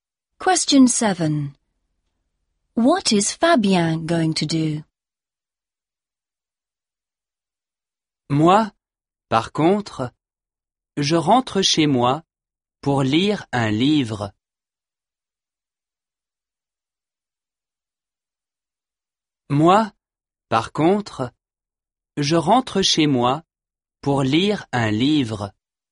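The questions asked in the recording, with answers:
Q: What is Fabien going to do?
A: Go home to read a book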